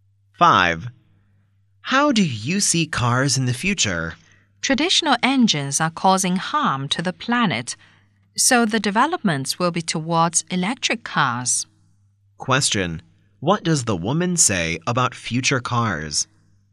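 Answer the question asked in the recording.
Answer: They will move towards electric cars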